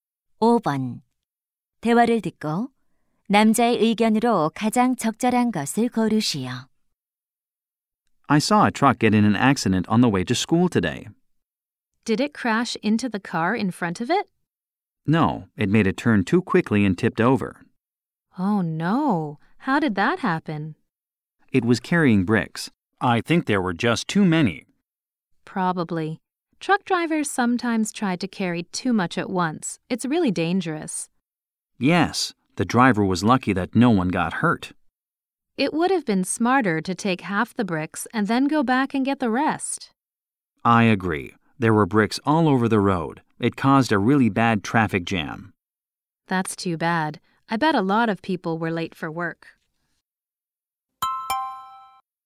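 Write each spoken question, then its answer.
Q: 대화를 듣고 남자의 의견으로 가장 적절한 것을 고르시오.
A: 트럭에 한 번에 너무 많은 짐을 싣는 것은 위험하다.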